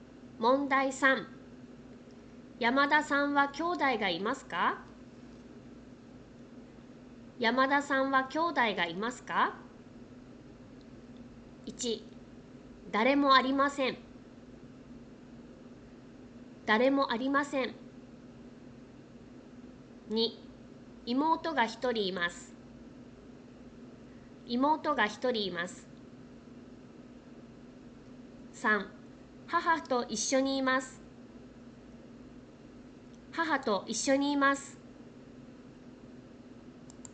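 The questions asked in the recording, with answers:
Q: 山田さんは兄弟がいますか?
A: 2: 妹が一人います。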